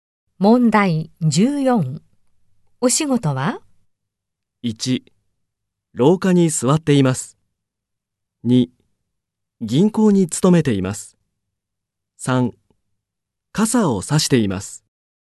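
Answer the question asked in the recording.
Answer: 2: 銀行に勤めています。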